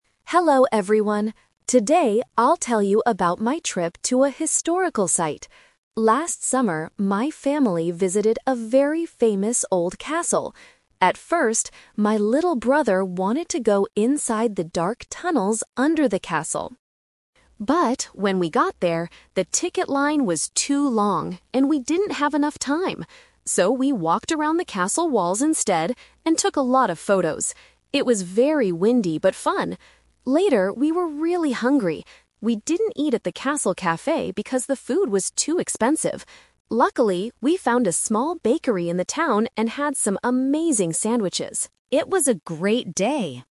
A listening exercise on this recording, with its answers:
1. What did the family do at the castle?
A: They walked around the walls.

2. Why didn't they go inside the tunnels?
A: The line was too long.

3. Where did the family have their food?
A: At a small bakery.

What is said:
Student: Hello everyone. Today I'll tell you about my trip to a historical site. Last summer, my family visited a very famous old castle. At first, my little brother wanted to go inside the dark tunnels under the castle.
But, when we got there, the ticket line was too long, and we didn't have enough time. So, we walked around the castle walls instead and took a lot of photos. It was very windy but fun! Later, we were really hungry. We didn't eat at the castle café because the food was too expensive. Luckily, we found a small bakery in the town and had some amazing sandwiches.